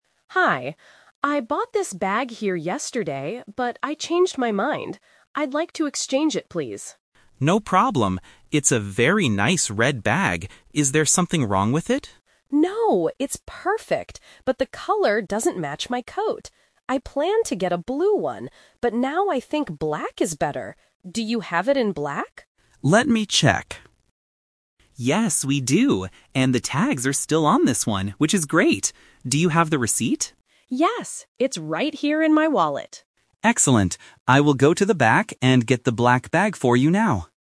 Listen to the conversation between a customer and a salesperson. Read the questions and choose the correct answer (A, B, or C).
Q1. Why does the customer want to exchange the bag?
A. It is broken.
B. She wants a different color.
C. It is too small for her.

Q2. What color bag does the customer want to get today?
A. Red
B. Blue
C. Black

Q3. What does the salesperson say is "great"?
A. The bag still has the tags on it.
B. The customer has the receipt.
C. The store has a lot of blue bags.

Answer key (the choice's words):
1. She wants a different color.
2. Black
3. The bag still has the tags on it.

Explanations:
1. The customer says, "the color doesn't match my coat." She wants to change the color. Why the trap is wrong: Option (A) is a trap. The salesperson asks, "Is there something wrong with it?" but the customer says, "No, it's perfect." Option (C) is not mentioned.
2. The customer finally asks, "Do you have it in black?" and the salesperson goes to get it. Why the trap is wrong: Option (A) is the color of the bag she is returning. Option (B) is the "Twist" trap: she planned to get a blue one before, but changed her mind again to black.
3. The salesperson explicitly says, "And the tags are still on this one, which is great." Why the trap is wrong: Option (B) is a trap. The customer does have the receipt, but the salesperson does not use the word "great" for the receipt; he says "Excellent." Option (C) is not mentioned.

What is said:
Customer: Hi. I bought this bag here yesterday, but I changed my mind. I'd like to exchange it, please.
Salesperson: No problem. It's a very nice red bag. Is there something wrong with it?
Customer: No, it's perfect, but the color doesn't match my coat. I planned to get a blue one, but now I think black is better. Do you have it in black?
Salesperson: Let me check... Yes, we do! And the tags are still on this one, which is great. Do you have the receipt?
Customer: Yes, it's right here in my wallet.